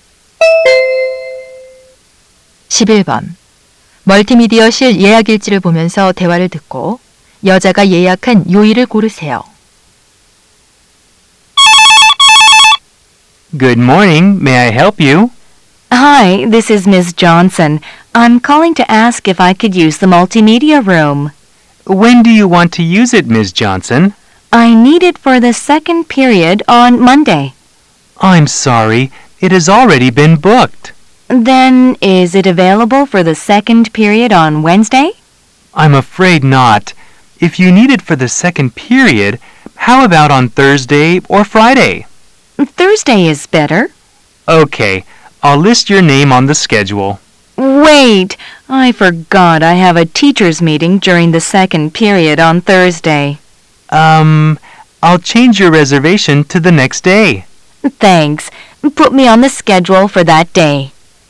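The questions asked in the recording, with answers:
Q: 멀티미디어실 예약일지를 보면서 대화를 듣고 여자가 예약한 요일을 고르세요.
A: 금요일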